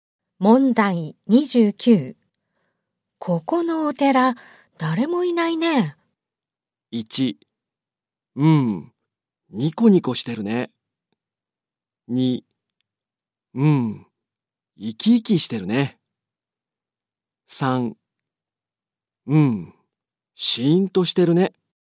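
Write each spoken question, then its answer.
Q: ここのお寺、誰もいないね。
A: 3: うん、シーンとしてるね。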